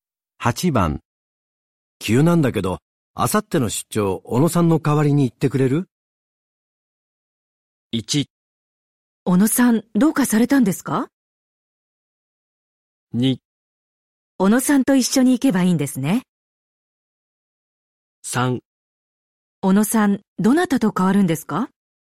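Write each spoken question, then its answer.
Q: 急なんだけど、あさっての出張、小野さんの代わりに行ってくれる?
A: 1: 小野さん、どうかされたんですか?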